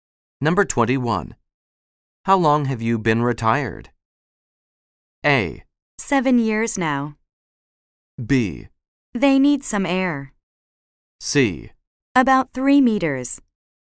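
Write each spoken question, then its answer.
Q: How long have you been retired?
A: A: 7 years now.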